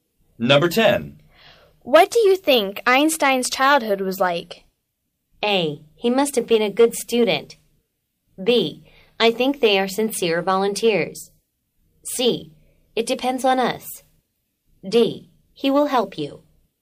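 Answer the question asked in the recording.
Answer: A: He must have been a good student.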